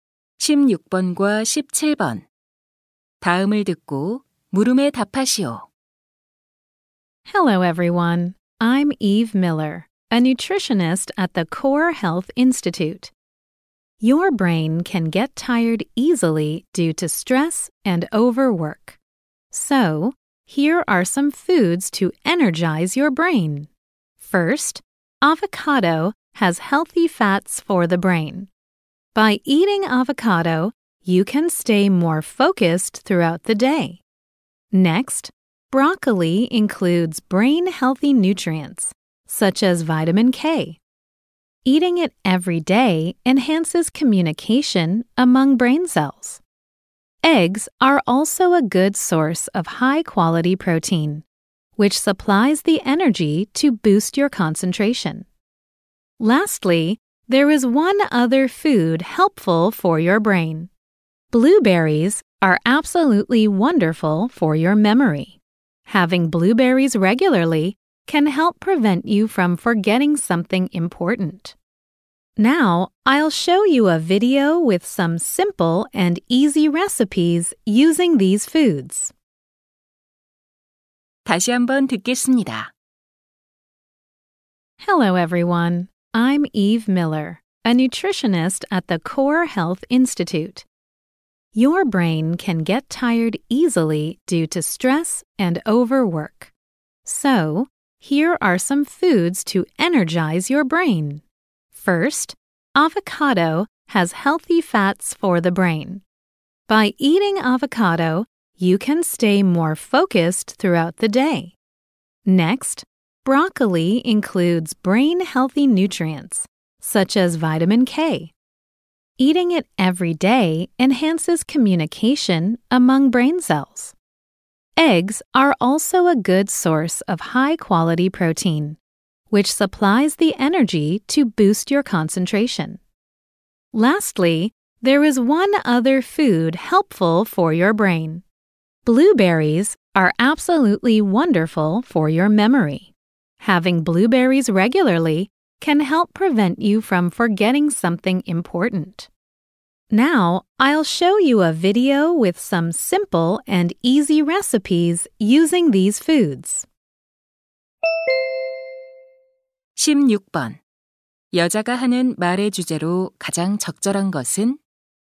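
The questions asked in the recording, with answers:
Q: 여자가 하는 말의 주제로 가장 적절한 것은?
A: 뇌에 활력을 주는 음식들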